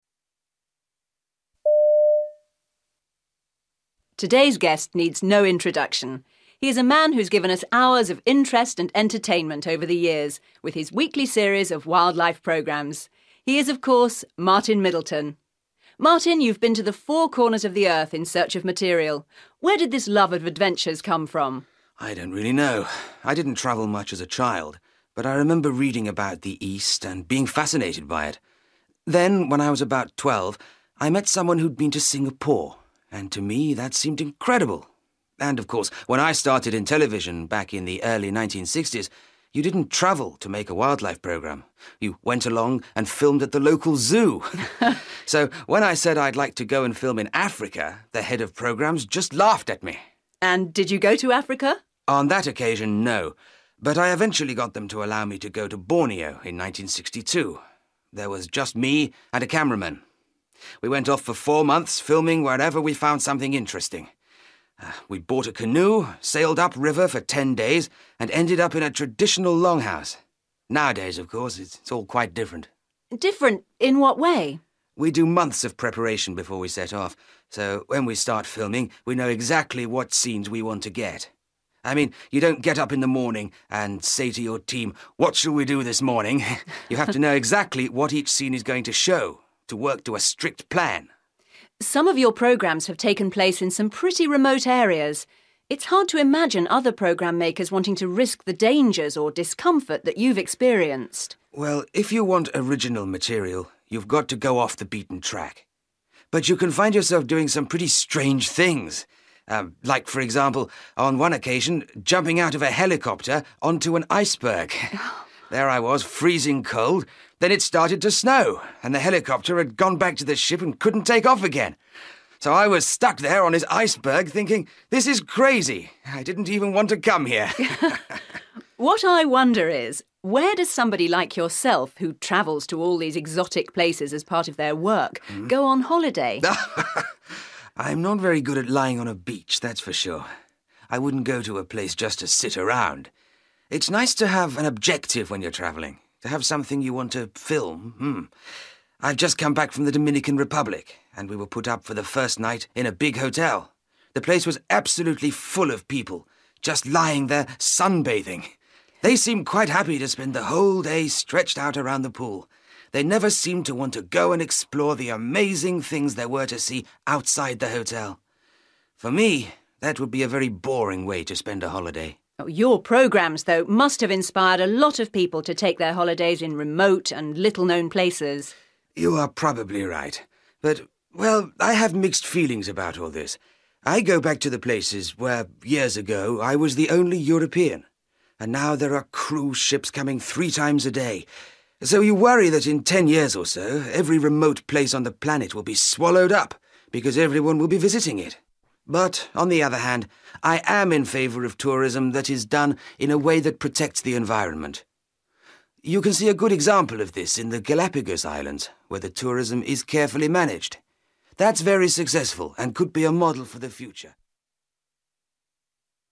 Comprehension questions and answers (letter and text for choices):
For questions 24-30, choose the best answer (A, B or C).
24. What was the origin of Martin Middleton's love of travel?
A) living abroad in the 1960s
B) something he read as a child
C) a television film about Africa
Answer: B) something he read as a child

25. When he visited Borneo, Martin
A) had no fixed expectations.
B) made a programme about life on the river.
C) became more interested in filming old buildings.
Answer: A) had no fixed expectations.

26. Since the early 1960s, wildlife filming has become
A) more relaxed.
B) more creative.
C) more organised.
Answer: C) more organised.

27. Looking back, Martin regards his experience on the iceberg as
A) slightly ridiculous.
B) extremely dangerous.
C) strangely depressing.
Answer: A) slightly ridiculous.

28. When he takes a holiday, Martin prefers to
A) relax by the sea.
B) stay in comfortable surroundings.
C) travel for a particular reason.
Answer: C) travel for a particular reason.

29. Martin thought that the holiday-makers he saw in the Dominican Republic were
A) risking their health.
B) wasting opportunities.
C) lacking entertainment.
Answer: B) wasting opportunities.

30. What is Martin's opinion of tourism?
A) It should be discouraged.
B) It can be a good thing.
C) It is well managed.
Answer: B) It can be a good thing.

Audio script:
Interviewer: Today's guest needs no introduction. He is a man who has given us hours of interest and entertainment over the years, with his weekly series of wildlife programmes. He is, of course, Martin Middleton. Martin, you've been to the four corners of the Earth in search of material. Where did this love of adventures come from?
Martin: I don't really know ... I didn't travel much as a child, but I remember reading about the East and being fascinated by it. Then, when I was about 12, I met someone who'd been to Singapore – and to me that seemed incredible ... and, of course, when I started in television, back in the early 1960s, you didn't travel to make a wildlife programme ... you went along and filmed at the local zoo. So, when I said I'd like to go and film in Africa, the Head of Programmes just laughed at me.
Interviewer: ... and, did you go to Africa?
Martin: On that occasion, no! But I eventually got them to allow me to go to Borneo in 1962. There was just me and a cameraman. We went off for four months, filming wherever we found something interesting. We bought a canoe, sailed up-river for ten days and ended up in a traditional longhouse. Nowadays, of course, it's all quite different.
Interviewer: Different? In what way ...?
Martin: We do months of preparation before we set off, so when we start filming, we know exactly what scenes we want to get. I mean, you don't get up in the morning and say to your team, 'What shall we do this morning?' You have to know exactly what each scene is going to show ... to work to a strict plan.
Interviewer: Some of your programmes have taken place in some pretty remote areas. It's hard to imagine other programme-makers wanting to risk the dangers or discomfort that you've experienced.
Martin: Well, if you want original material – you've got to go off the beaten track ... but you can find yourself doing some pretty strange things ... um ... like, for example, on one occasion, jumping out of a helicopter onto an iceberg. There I was ... freezing cold ... then it started to snow ... and the helicopter had gone back to the ship and couldn't take off again. So I was stuck there, on this iceberg, thinking, 'This is crazy ... I didn't even want to come here!'
Interviewer: What I wonder is ... where does somebody like yourself, who travels to all these exotic places as part of their work, go on holiday?
Martin: (laughs) I'm not very good at lying on a beach – that's for sure. I wouldn't go to a place just to sit around. It's nice to have an objective when you're travelling ... to have something you want to film ... mm ... I've just come back from the Dominican Republic, and we were put up for the first night in a big hotel ... The place was absolutely full of people, just lying there sunbathing. They seemed quite happy to spend the whole day stretched out around the pool ... they never seemed to want to go and explore the amazing things there were to see outside the hotel. For me, that would be a very boring way to spend a holiday.
Interviewer: Your programmes, though, must have inspired a lot of people to take their holidays in remote and little-known places.
Martin: You are probably right, but ... well ... I have mixed feelings about all this. I go back to the places where, years ago, I was the only European, and now there are cruise ships coming three times a day. So, you worry that in ten years or so, every remote place on the planet will be swallowed up, because everyone will be visiting it. But, on the other hand, I am in favour of tourism that is done in a way that protects the environment. You can see a good example of this in the Galapagos Islands, where the tourism is carefully managed. That's very successful, and could be a model for the future ...

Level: B2